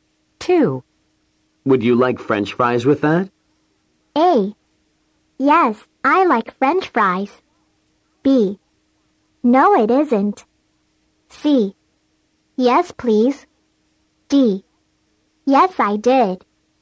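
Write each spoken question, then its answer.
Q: Would you like French fries with that?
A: C: Yes, please.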